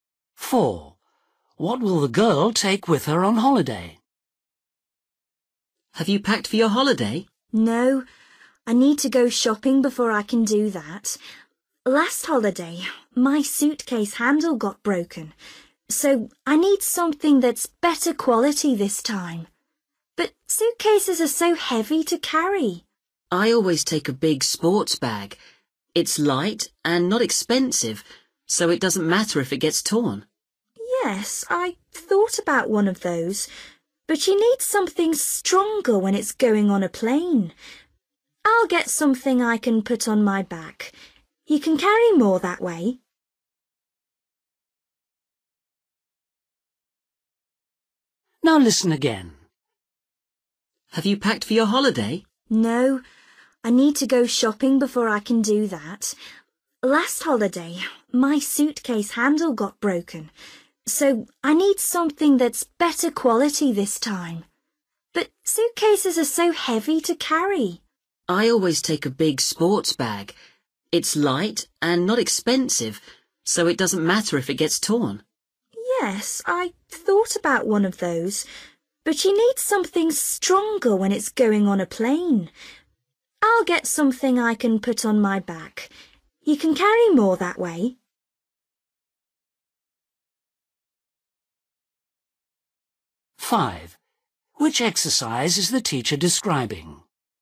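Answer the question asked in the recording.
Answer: A backpack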